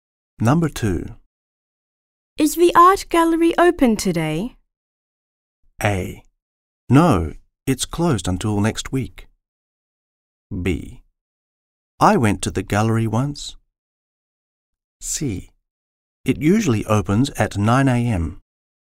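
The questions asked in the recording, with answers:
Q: Is the art gallery open today?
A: A: No, it's closed until next week.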